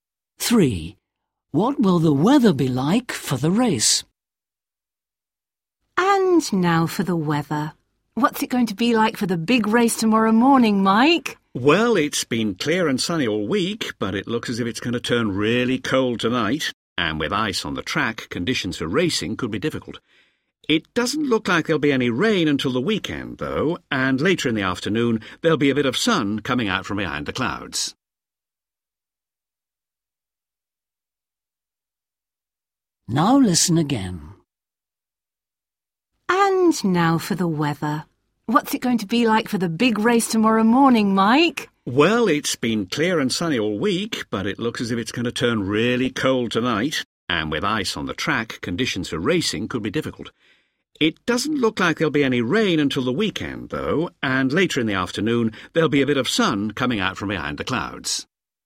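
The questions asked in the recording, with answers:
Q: What will the weather be like for the race?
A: Very cold and icy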